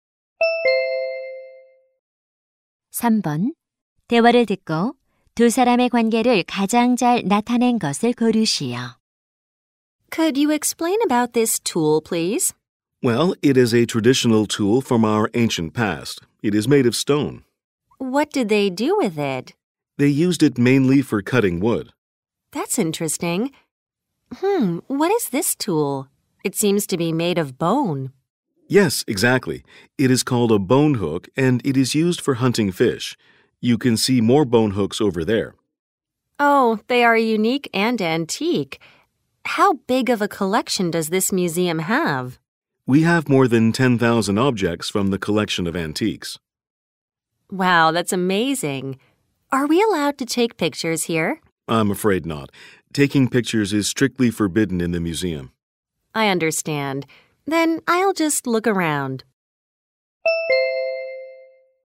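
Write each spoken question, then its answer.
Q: 대화를 듣고 두 사람의 관계를 가장 잘 나타낸 것을 고르시오.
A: 박물관 안내원 - 관람객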